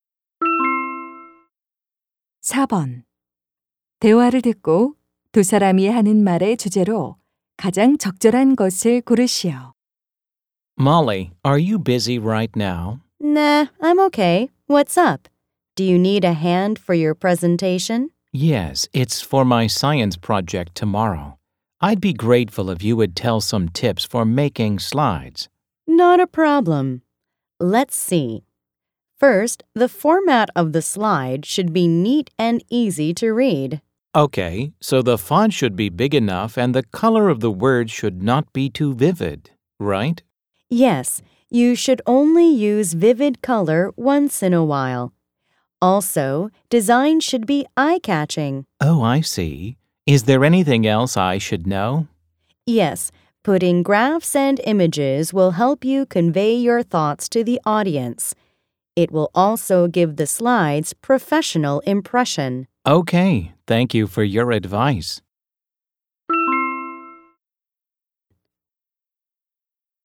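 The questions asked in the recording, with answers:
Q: 대화를 듣고 두 사람이 하는 말의 주제로 가장 적절한 것을 고르시오.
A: 발표 슬라이드를 만드는 요령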